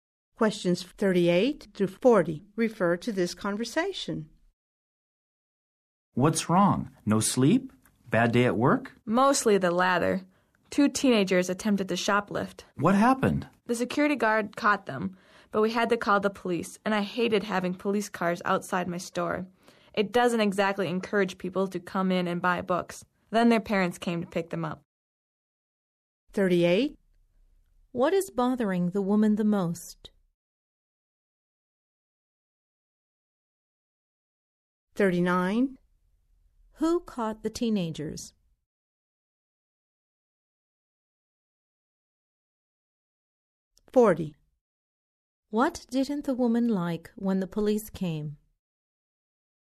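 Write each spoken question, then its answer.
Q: What is bothering the woman the most?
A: Teenagers tried to shoplift at her store (a bad day at work)

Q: Who caught the teenagers?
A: The security guard

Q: What didn't the woman like when the police came?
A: Police cars outside her store, which discourage customers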